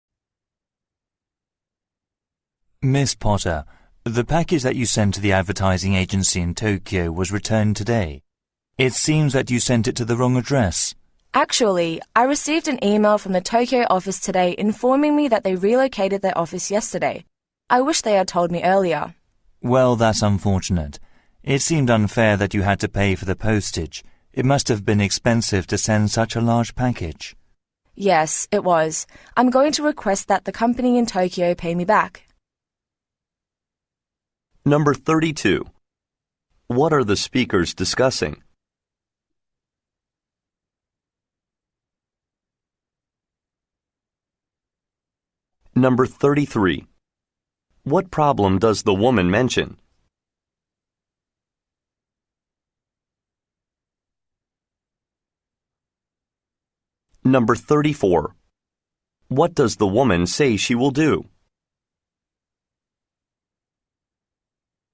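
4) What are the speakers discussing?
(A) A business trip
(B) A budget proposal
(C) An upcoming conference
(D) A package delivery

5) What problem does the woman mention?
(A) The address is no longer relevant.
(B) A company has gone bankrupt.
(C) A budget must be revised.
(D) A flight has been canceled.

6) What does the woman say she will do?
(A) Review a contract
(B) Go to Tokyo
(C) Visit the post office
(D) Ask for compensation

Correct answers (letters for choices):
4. D
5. A
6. D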